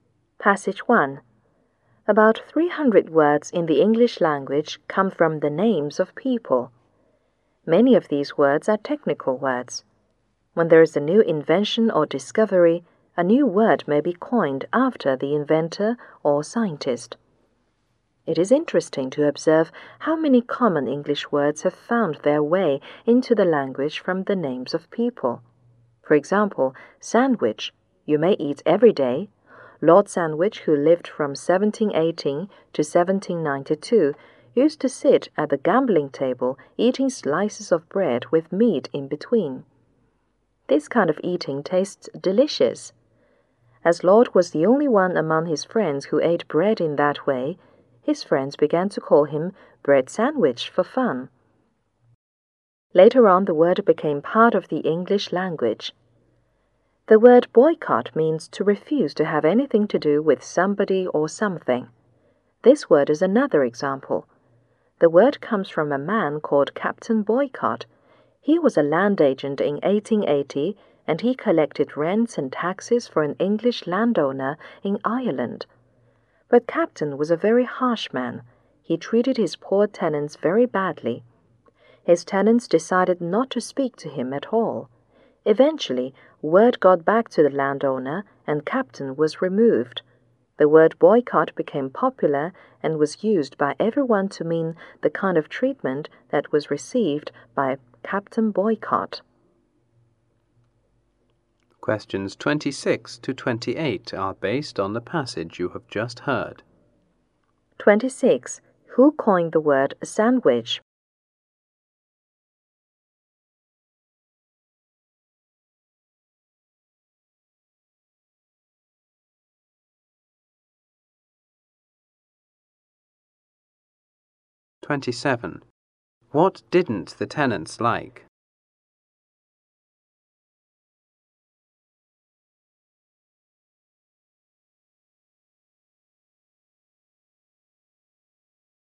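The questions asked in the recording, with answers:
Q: Who coined the word sandwich?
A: Lord Sandwich's friends

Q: What didn't the tenants like?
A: Captain Boycott's harsh treatment of them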